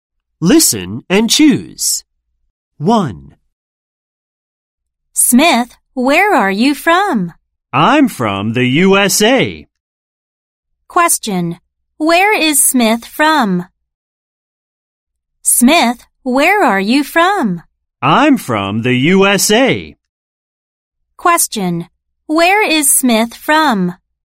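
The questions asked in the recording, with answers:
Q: Where is Smith from?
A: The USA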